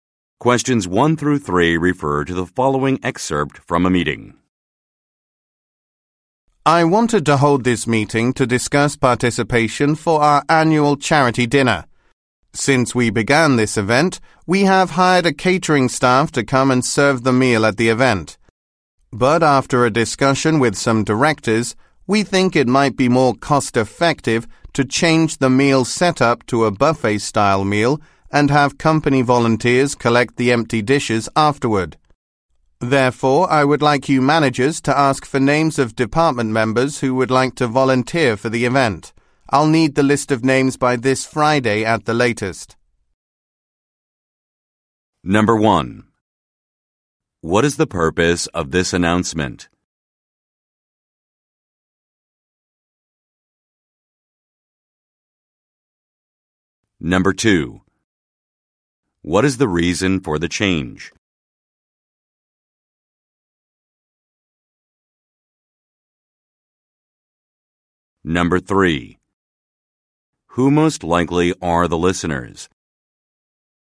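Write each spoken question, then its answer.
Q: What is the purpose of this announcement?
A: To ask for volunteers for the annual charity dinner

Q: What is the reason for the change?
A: To save money (more cost-effective)

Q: Who most likely are the listeners?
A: Managers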